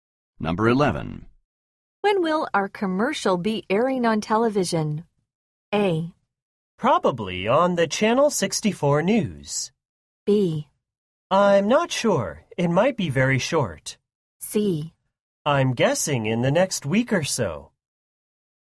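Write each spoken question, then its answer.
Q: When will our commercial be airing on television?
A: C: I'm guessing in the next week or so.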